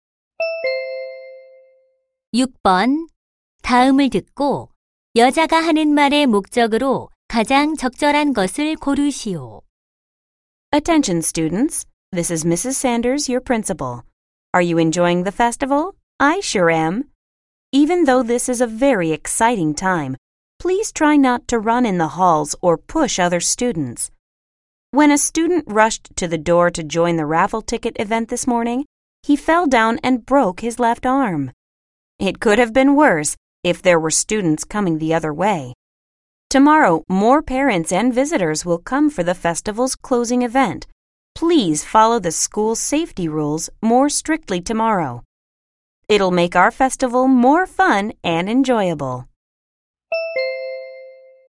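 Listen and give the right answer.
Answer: 학교 안전 수칙 준수 당부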